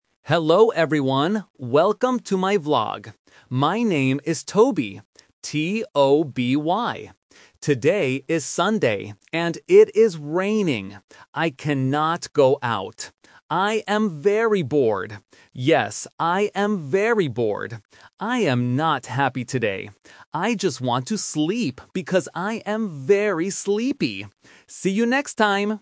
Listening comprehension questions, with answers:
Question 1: What is the vlogger's name?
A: Toby

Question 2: How does the vlogger feel today?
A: Bored

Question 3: What does he want to do?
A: Sleep

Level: A1